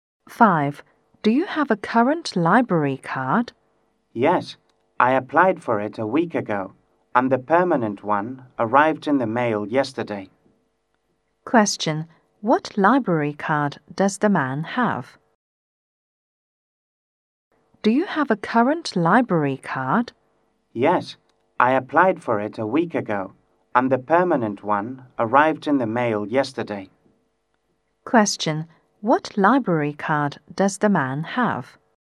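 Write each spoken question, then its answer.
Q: What library card does the man have?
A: A permanent one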